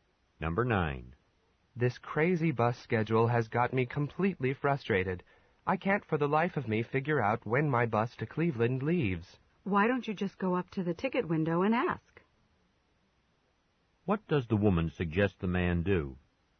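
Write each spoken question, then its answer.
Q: What does the woman suggest the man do?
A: Ask at the ticket window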